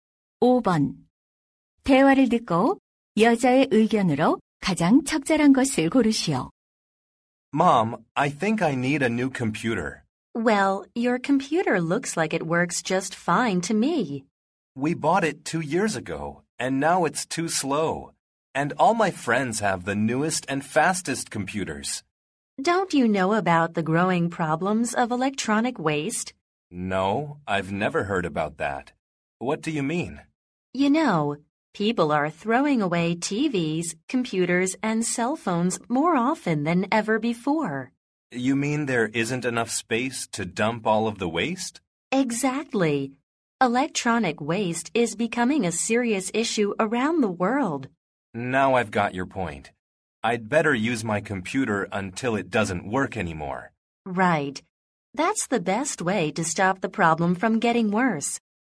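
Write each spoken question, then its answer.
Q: 대화를 듣고 여자의 의견으로 가장 적절한 것을 고르시오.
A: 전자 폐기물 문제를 줄이기 위해 전자제품을 오래 사용해야 한다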